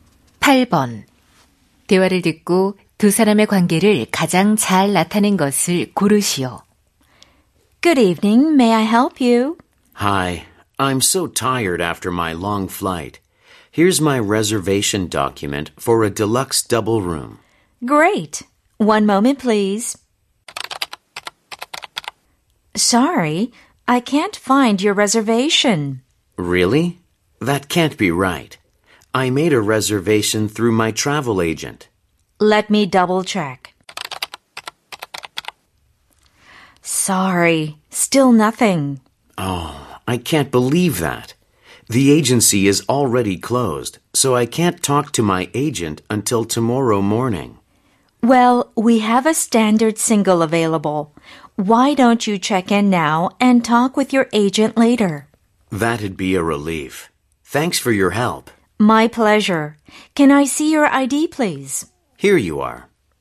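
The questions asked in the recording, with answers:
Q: 대화를 듣고 두 사람의 관계를 가장 잘 나타낸 것을 고르시오.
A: 호텔 투숙객 - 호텔 프런트 직원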